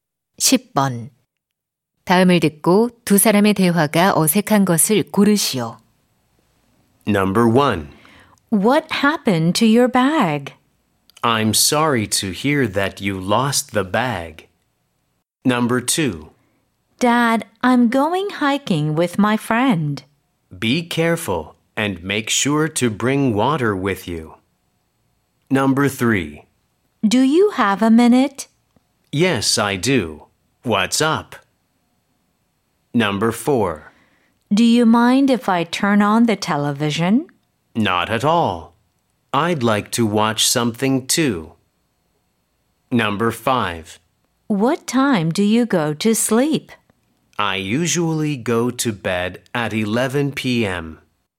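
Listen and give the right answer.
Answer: 1: What happened to your bag? / I'm sorry to hear that you lost the bag.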